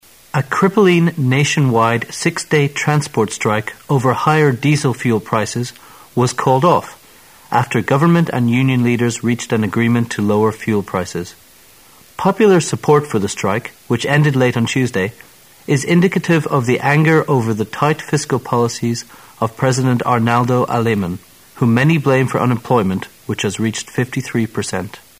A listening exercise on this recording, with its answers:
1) What's the agreement between the government and the union leaders about?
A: Reducing fuel prices.

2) Which can best describe the strikers' attitude to the fiscal policies of the government?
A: Unhappy.

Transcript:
[解析] 21-22 A crippling, nationwide six-day transport strike over higher diesel fuel prices was called off after government and union leaders reached an agreement to lower fuel prices. Popular support for the strike, which ended late on Tuesday, is indicative of the anger over the tight fiscal policies of President Arnoldo Aleman, whom many blame for unemployment which has reached 53 per cent.